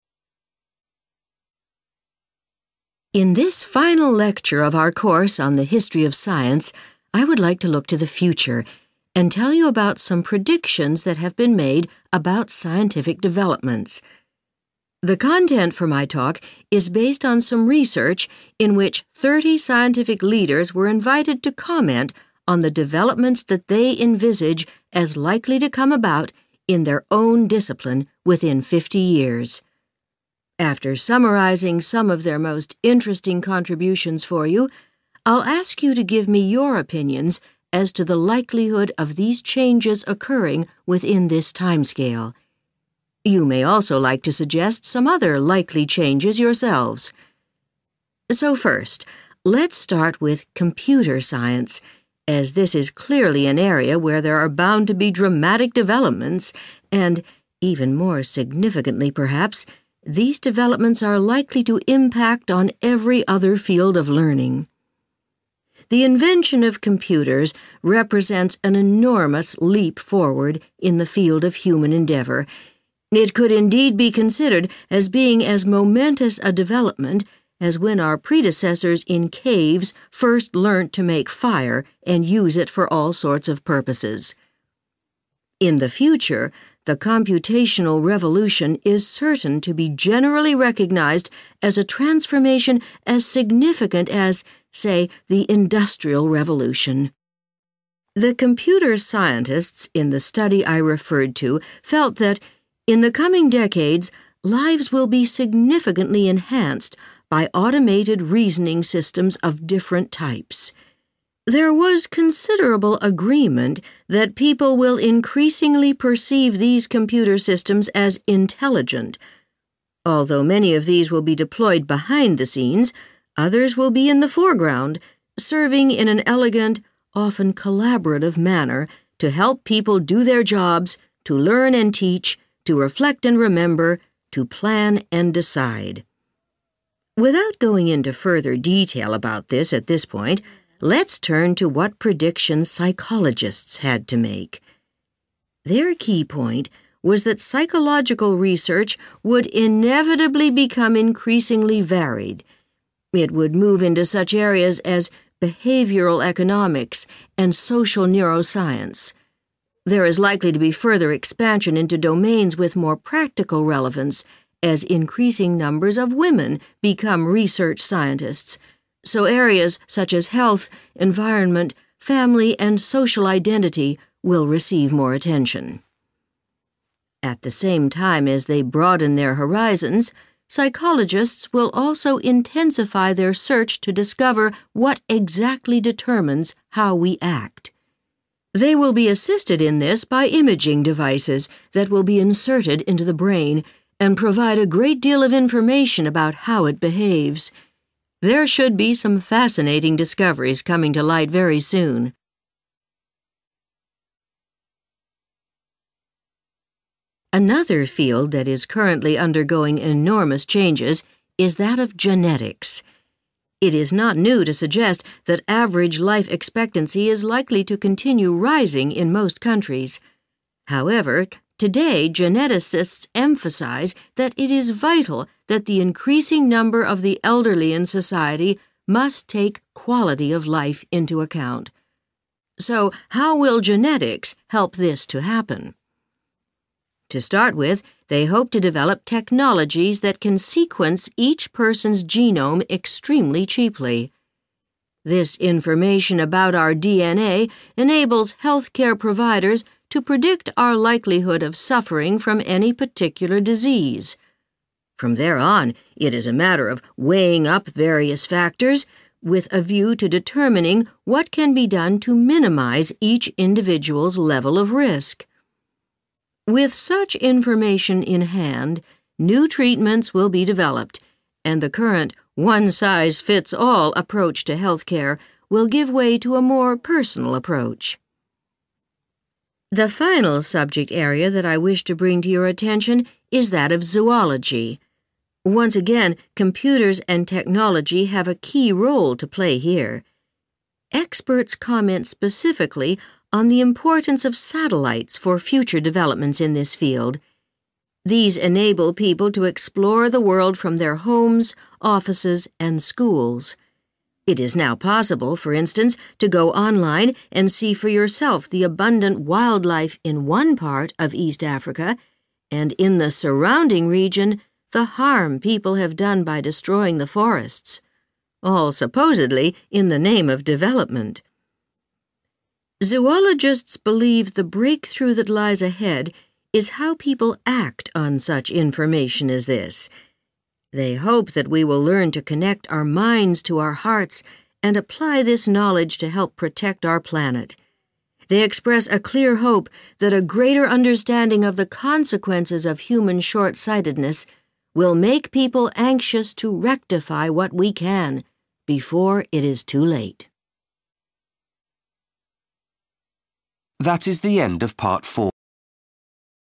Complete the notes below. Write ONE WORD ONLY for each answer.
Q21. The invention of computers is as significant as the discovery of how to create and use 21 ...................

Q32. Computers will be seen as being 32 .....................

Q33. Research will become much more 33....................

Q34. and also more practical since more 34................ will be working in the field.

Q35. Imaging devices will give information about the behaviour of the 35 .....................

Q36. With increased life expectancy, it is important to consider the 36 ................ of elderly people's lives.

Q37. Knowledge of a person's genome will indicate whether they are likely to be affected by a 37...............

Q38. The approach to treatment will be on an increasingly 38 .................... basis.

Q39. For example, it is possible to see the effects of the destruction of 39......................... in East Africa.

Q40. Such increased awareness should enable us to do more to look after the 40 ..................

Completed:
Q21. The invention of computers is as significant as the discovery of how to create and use Fire
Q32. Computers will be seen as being Intelligent
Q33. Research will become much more Varied
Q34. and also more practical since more Women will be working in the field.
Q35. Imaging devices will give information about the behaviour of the Brain
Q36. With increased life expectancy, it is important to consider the Quality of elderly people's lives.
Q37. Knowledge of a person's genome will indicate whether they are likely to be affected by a Disease
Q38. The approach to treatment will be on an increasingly Personal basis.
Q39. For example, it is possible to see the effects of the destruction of Forests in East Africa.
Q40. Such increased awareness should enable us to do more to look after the Planet